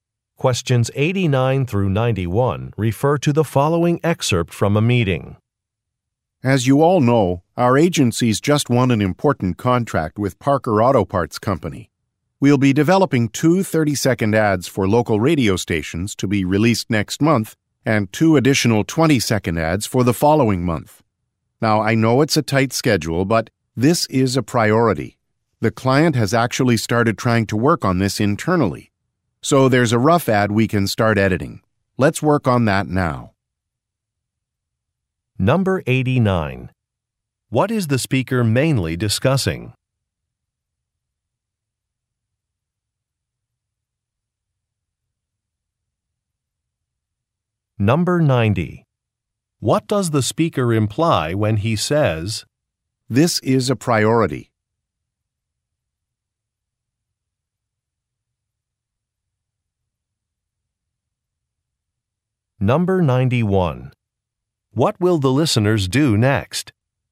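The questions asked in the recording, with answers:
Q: What is the speaker mainly discussing?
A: Making radio ads for a new client, Parker Auto Parts

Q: What does the speaker imply when he says,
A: The ad work must be done first despite the tight schedule

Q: What will the listeners do next?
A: Start editing the client's rough ad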